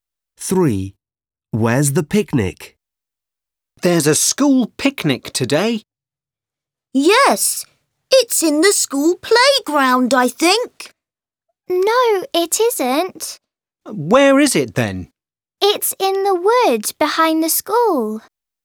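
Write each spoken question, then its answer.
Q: Where's the picnic?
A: in the woods behind the school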